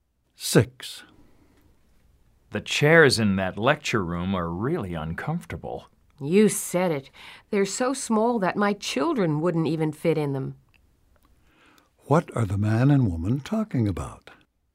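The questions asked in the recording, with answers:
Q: What are the man and woman talking about?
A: The uncomfortable, small chairs in the lecture room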